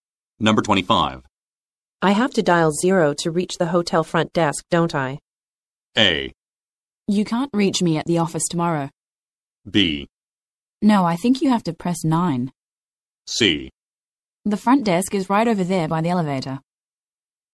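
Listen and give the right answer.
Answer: B: No, I think you have to press 9.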